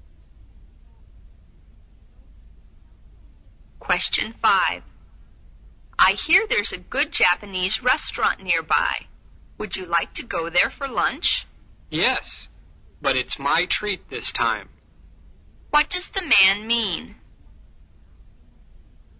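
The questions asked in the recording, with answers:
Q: What does the man mean?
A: He will pay for lunch this time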